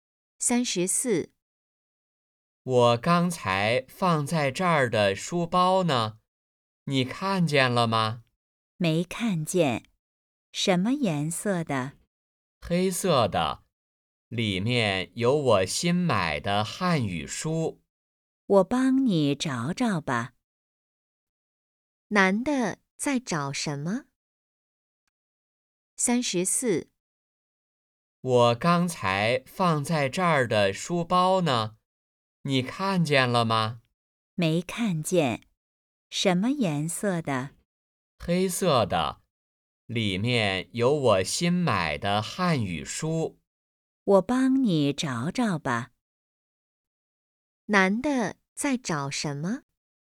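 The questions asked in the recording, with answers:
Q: 男的在找什么?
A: 书包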